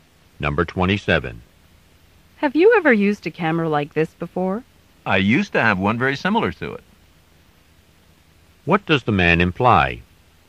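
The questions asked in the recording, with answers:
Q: What does the man imply?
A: He knows how to use this kind of camera.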